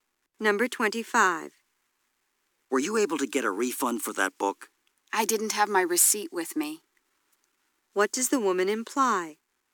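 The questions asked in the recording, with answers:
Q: What does the woman imply?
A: She couldn't get a refund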